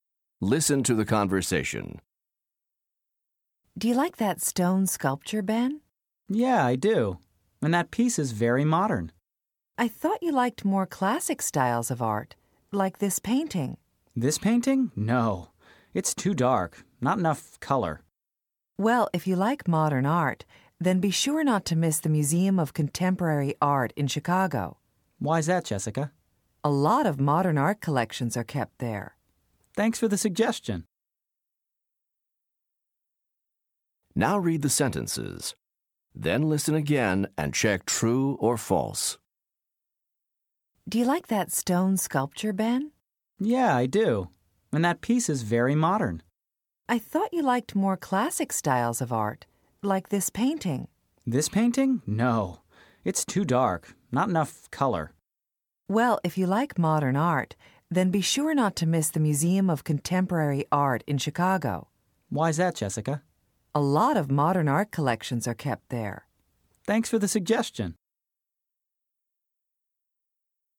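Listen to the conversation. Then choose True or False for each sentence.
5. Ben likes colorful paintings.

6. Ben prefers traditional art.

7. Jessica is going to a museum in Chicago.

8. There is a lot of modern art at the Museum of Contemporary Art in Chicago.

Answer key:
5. True
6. False
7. False
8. True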